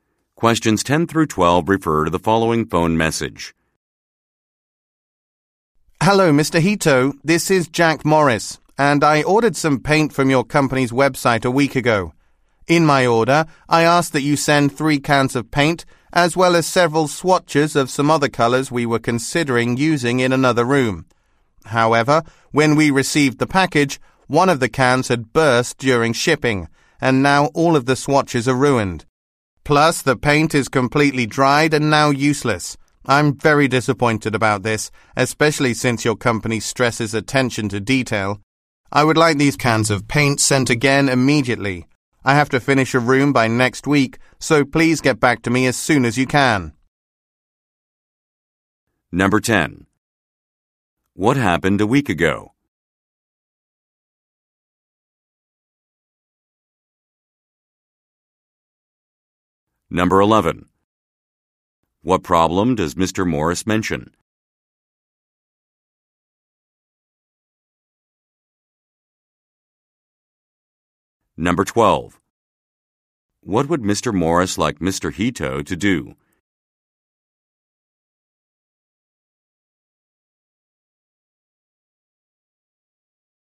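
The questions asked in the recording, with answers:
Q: What happened a week ago?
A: Mr. Morris ordered paint from the company's website

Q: What problem does Mr. Morris mention?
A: A paint can burst during shipping and ruined the swatches

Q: What would Mr. Morris like Mr. Hito to do?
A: Send the cans of paint again immediately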